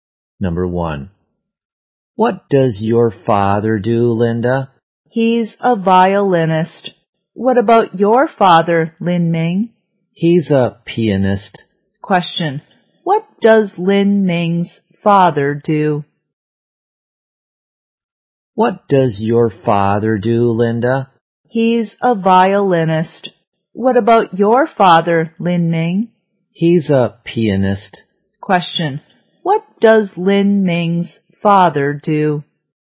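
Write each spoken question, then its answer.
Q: What does Lin Ming's father do?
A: He's a pianist.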